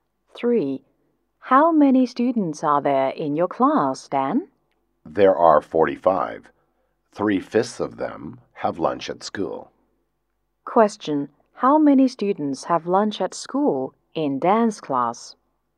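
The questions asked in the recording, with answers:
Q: How many students have lunch at school in Dan's class?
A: 27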